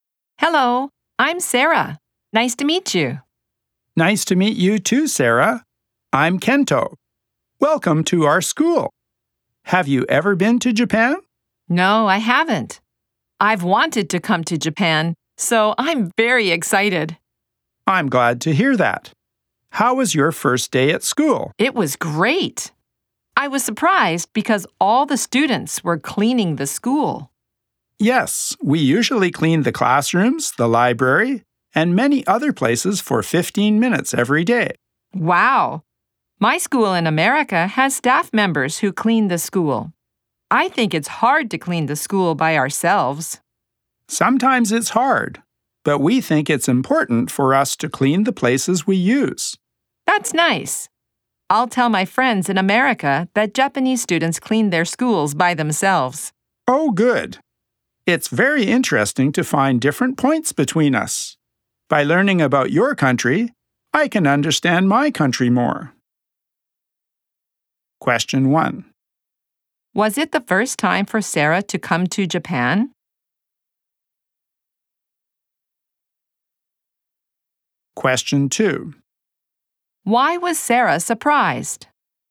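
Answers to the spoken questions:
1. Yes, it was.
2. Because all the students were cleaning the school.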